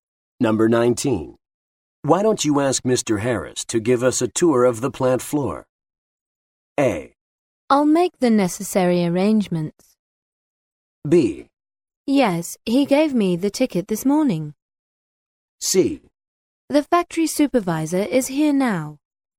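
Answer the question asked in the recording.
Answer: A: I'll make the necessary arrangements.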